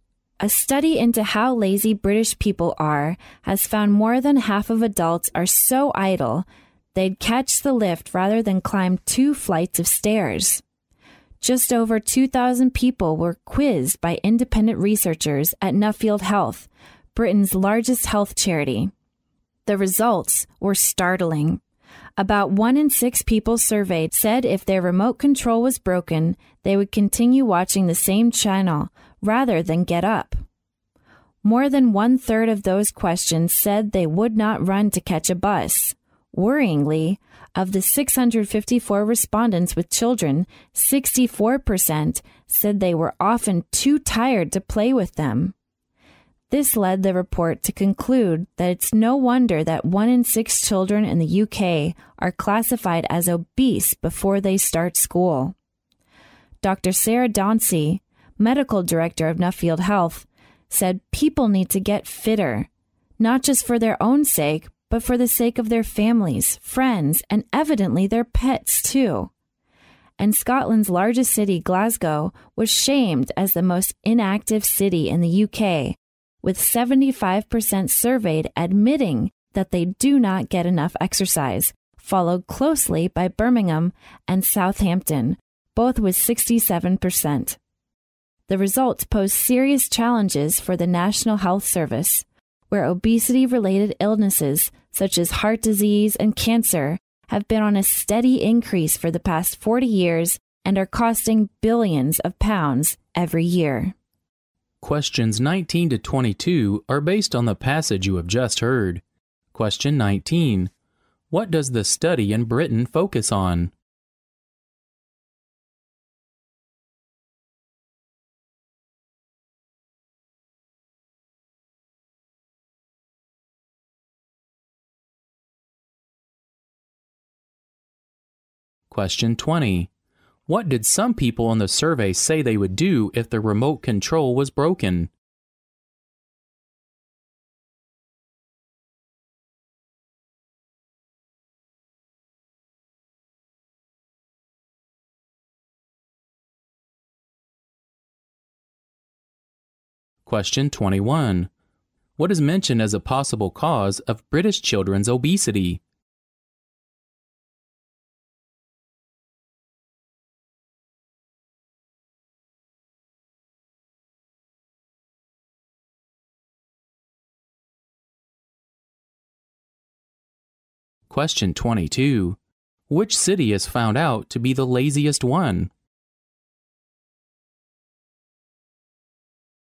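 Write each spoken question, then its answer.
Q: What does the study in Britain focus on?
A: How lazy British people are

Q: What did some people in the survey say they would do if the remote control was broken?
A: Continue watching the same channel rather than get up

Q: What is mentioned as a possible cause of British children's obesity?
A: Parents are often too tired to play with them

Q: Which city is found out to be the laziest one?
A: Glasgow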